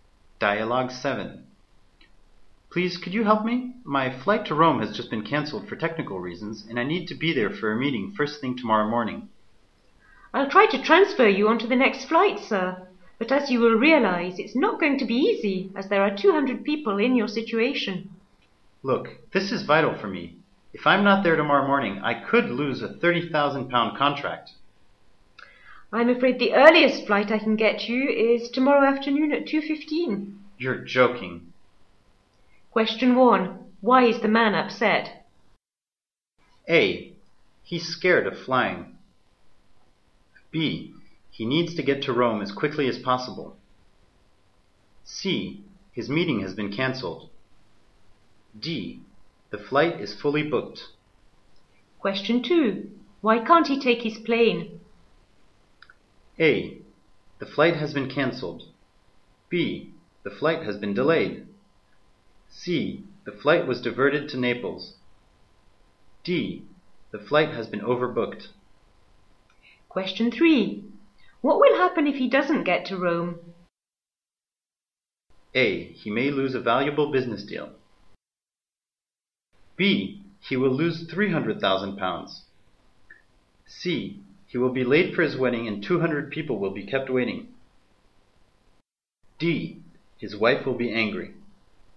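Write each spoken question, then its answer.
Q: Why is the man upset?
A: B: He needs to get to Rome as quickly as possible.

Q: Why can't he take his plane?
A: A: The flight has been cancelled.

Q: What will happen if he doesn't get to Rome?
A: A: He may lose a valuable business deal.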